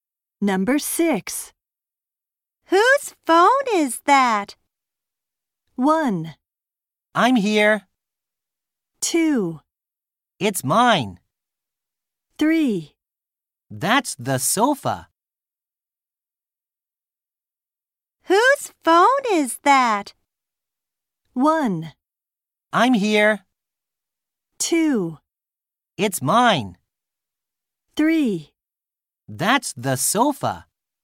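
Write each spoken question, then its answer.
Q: Whose phone is that?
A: 2: It's mine.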